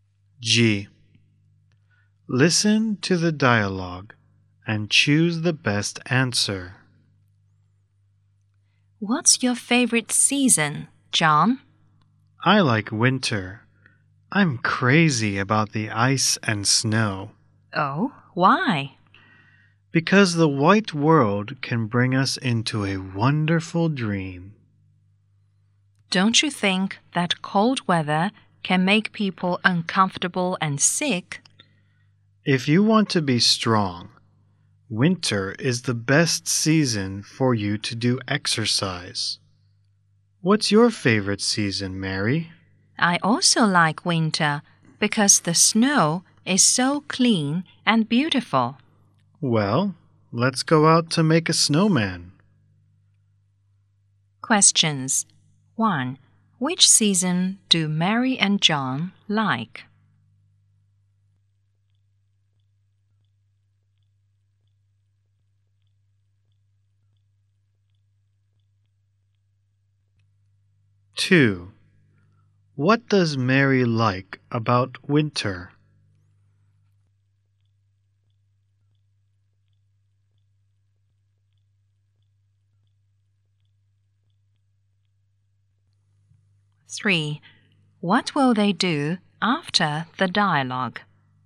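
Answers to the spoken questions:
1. Winter
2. The snow is so clean and beautiful
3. Go out to make a snowman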